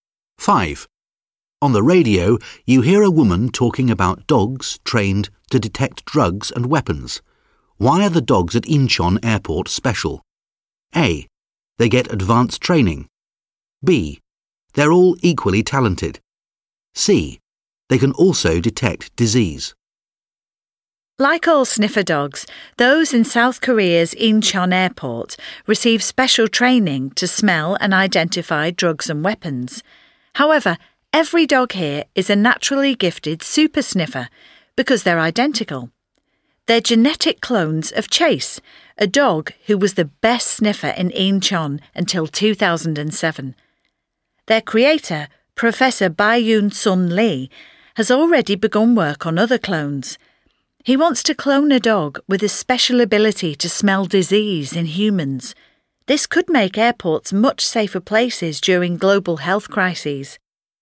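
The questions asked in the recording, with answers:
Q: Why are the dogs at Incheon Airport special?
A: B: They're all equally talented.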